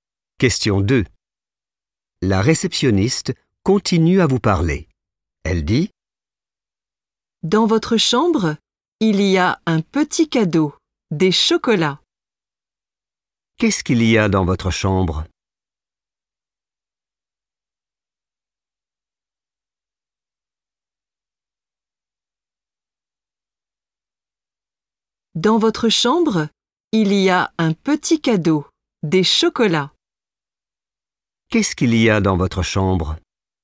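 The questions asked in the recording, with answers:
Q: Qu'est-ce qu'il y a dans votre chambre?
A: des chocolats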